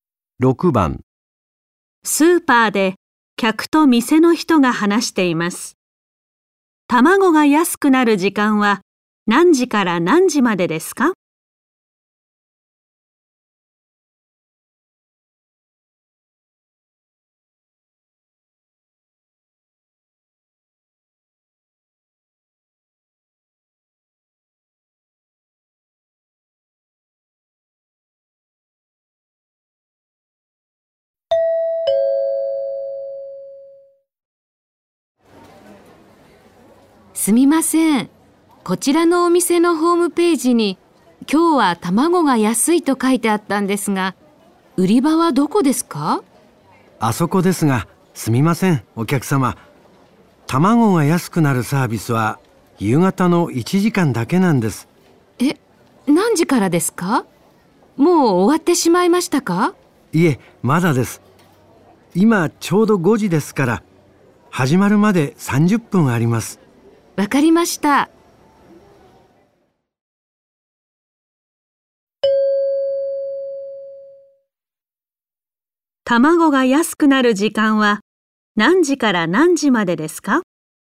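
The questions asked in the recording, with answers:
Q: 卵が安くなる時間は何時から何時までですか?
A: 5時半から6時半まで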